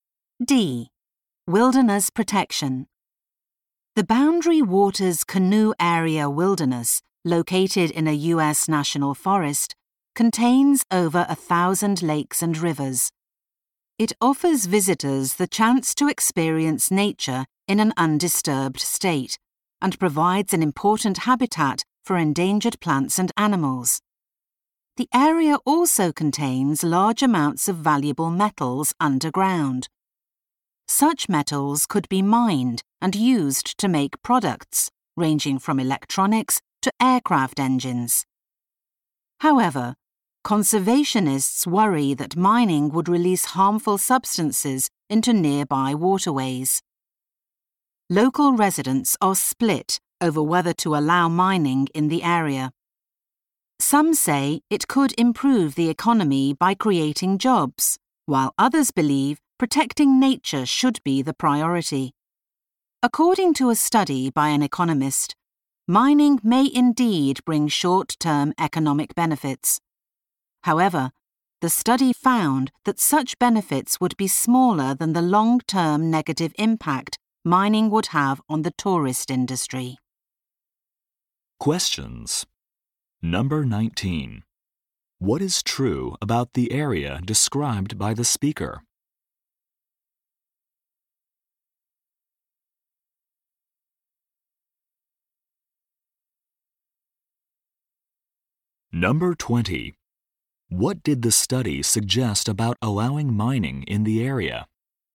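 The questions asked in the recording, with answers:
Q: What did the study suggest about allowing mining in the area?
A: Its long-term harm to tourism would outweigh its short-term economic benefits.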